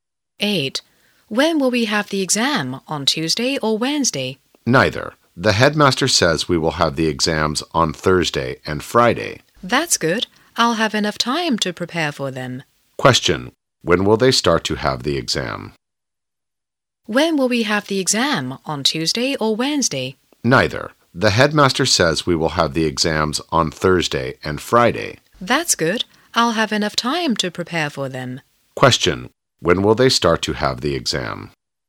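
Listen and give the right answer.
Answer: On Thursday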